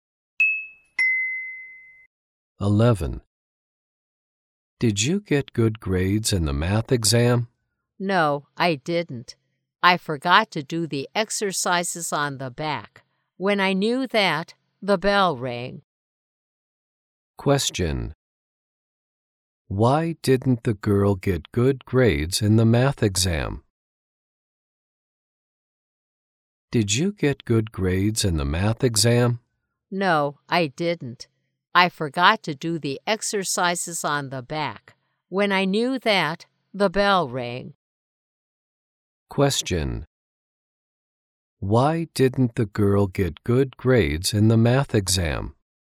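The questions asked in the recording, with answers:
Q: Why didn't the girl get good grades in the math exam?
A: She forgot to do the exercises on the back.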